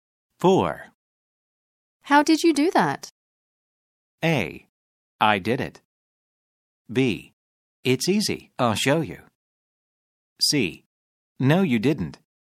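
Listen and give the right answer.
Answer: B: It's easy. I'll show you.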